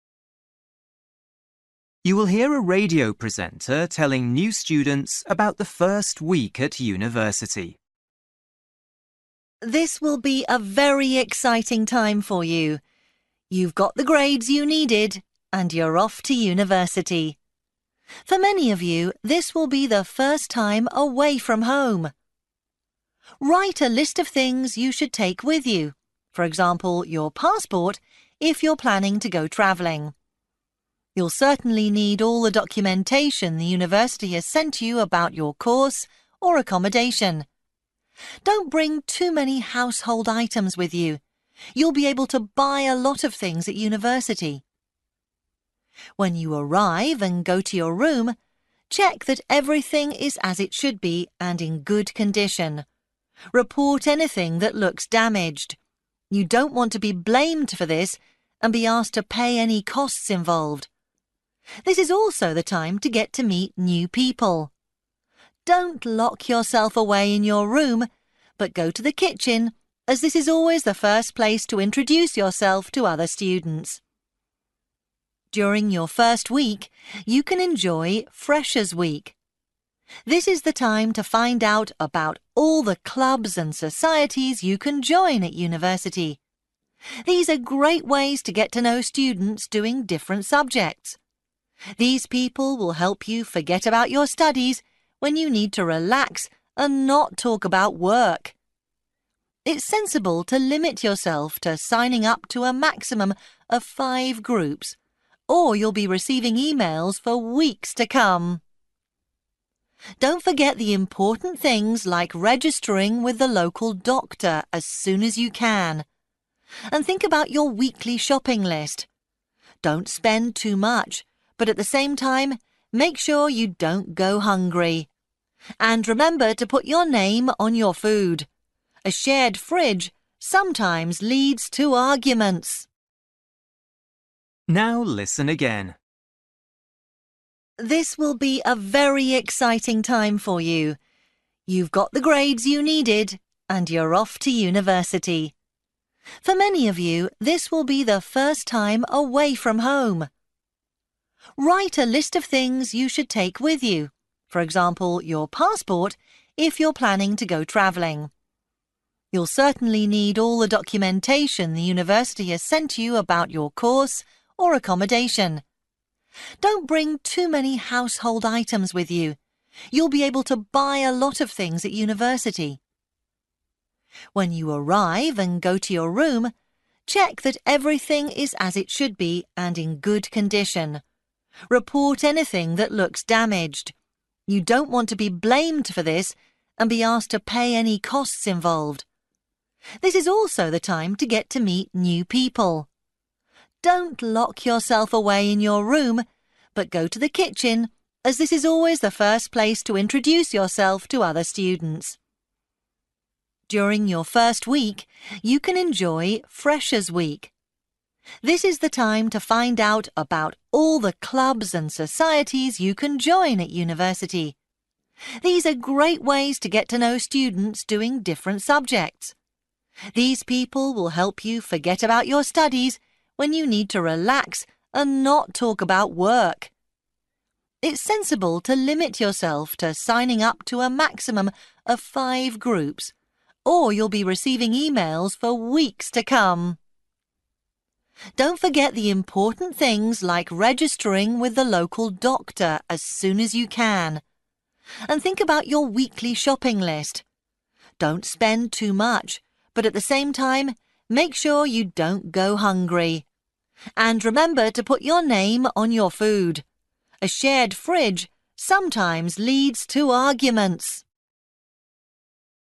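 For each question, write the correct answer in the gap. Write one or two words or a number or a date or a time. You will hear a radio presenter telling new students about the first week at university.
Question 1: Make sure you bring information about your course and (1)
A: accommodation

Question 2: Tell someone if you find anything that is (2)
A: damaged

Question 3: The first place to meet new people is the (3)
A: kitchen

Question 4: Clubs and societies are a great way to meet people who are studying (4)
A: different subjects

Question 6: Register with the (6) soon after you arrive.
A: local doctor

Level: Luyện nghe trình độ B1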